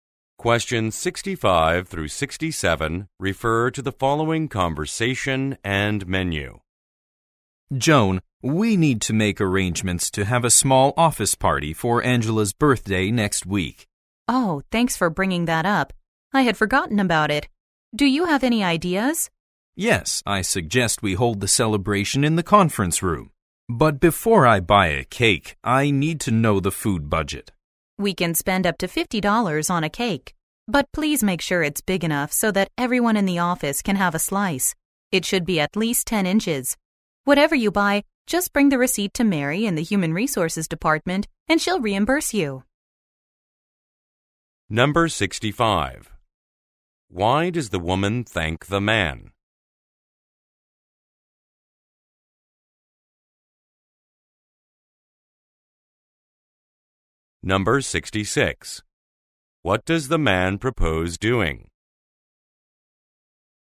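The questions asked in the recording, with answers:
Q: Why does the woman thank the man?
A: For reminding her about Angela's birthday party

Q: What does the man propose doing?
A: Holding the celebration in the conference room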